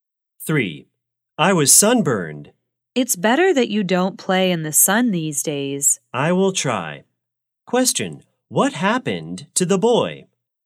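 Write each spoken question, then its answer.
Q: Question, what happened to the boy?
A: He was sunburned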